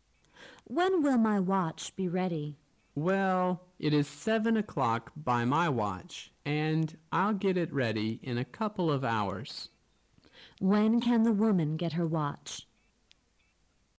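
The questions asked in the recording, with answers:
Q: When can the woman get her watch?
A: At about 9 o'clock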